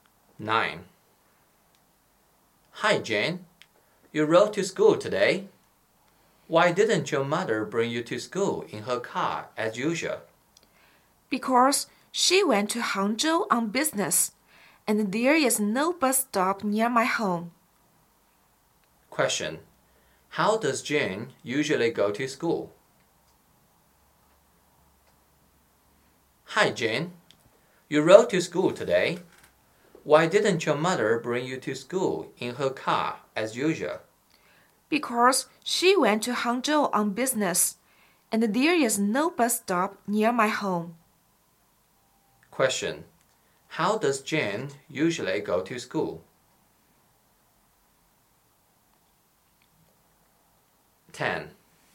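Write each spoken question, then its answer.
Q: Question. How does Jane usually go to school?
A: Her mother drives her in her car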